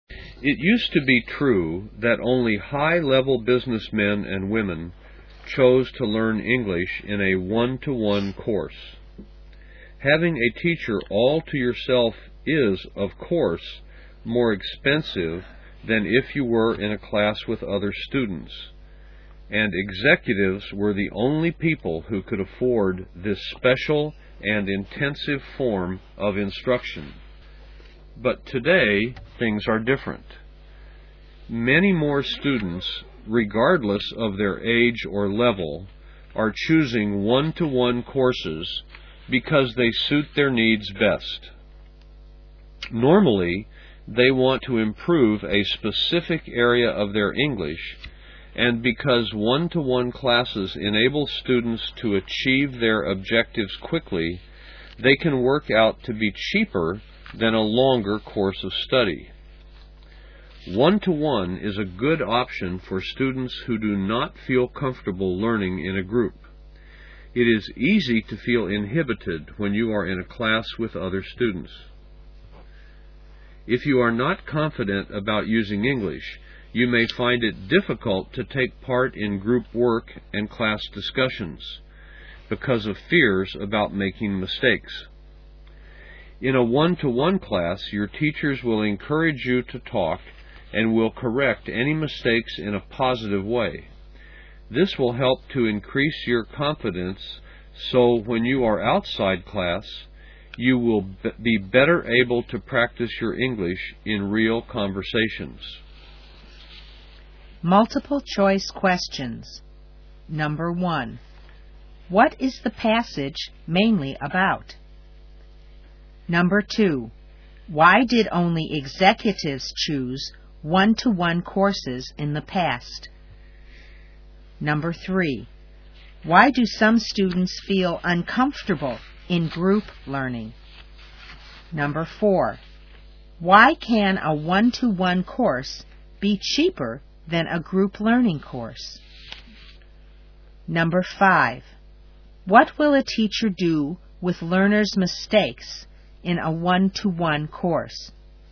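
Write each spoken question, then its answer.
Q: What is the passage mainly about?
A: One-to-one English courses and their advantages

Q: Why did only executives choose one-to-one courses in the past?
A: Because they were expensive and only executives could afford them

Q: Why do some students feel uncomfortable in group learning?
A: They fear making mistakes and feel inhibited

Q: Why can a one-to-one course be cheaper than a group learning course?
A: Students achieve their objectives quickly, so it is shorter

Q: What will a teacher do with learners' mistakes in a one-to-one course?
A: Correct them in a positive way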